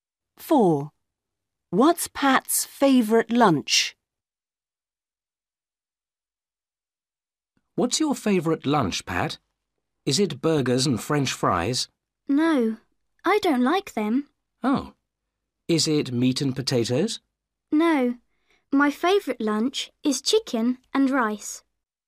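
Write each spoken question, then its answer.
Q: What's Pat's favorite lunch?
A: Chicken and rice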